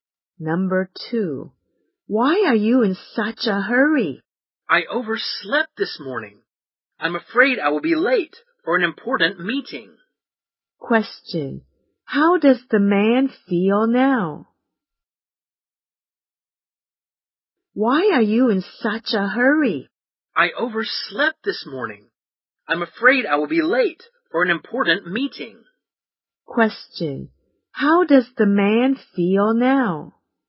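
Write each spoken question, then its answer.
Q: how does the man feel now?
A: Worried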